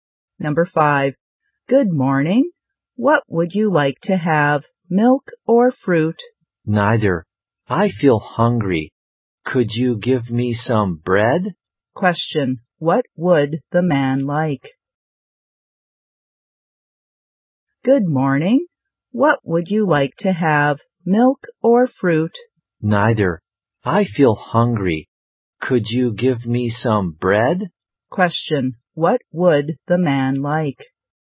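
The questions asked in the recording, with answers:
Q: What would the man like?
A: Some bread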